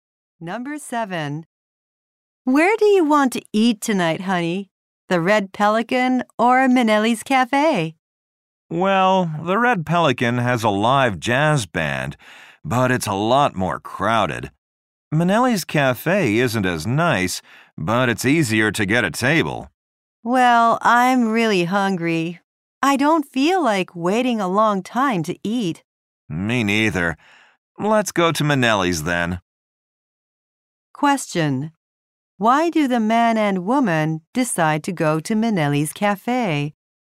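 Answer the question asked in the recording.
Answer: They don't want to wait long to eat.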